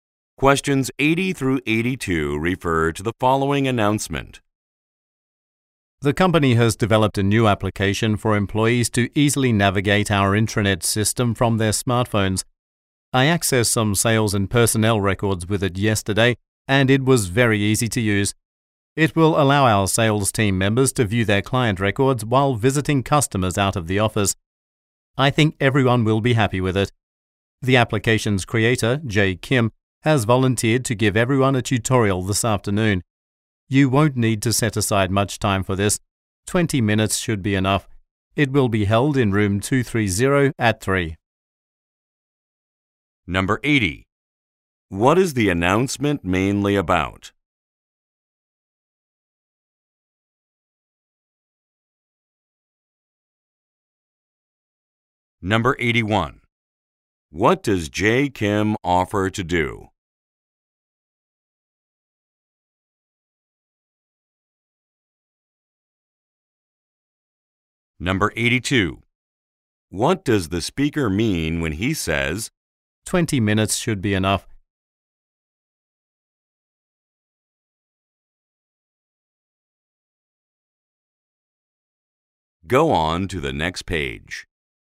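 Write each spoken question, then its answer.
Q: What is the announcement mainly about?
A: A new smartphone application for the intranet

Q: What does Jay Kim offer to do?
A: Give a tutorial

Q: What does the speaker mean when he says, 20 minutes should be enough?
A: The tutorial will not take long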